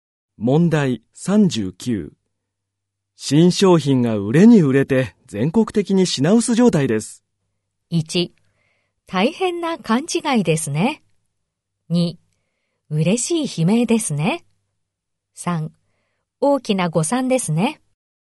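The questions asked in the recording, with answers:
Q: 新商品が売れに売れて全国的に品薄状態です。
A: 2: 嬉しい悲鳴ですね。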